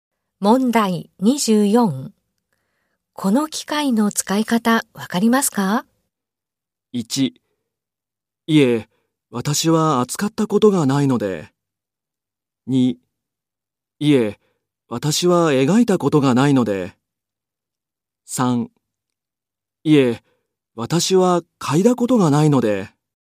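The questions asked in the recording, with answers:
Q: この機械の使い方わかりますか?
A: 1: いえ、私は扱ったことがないので。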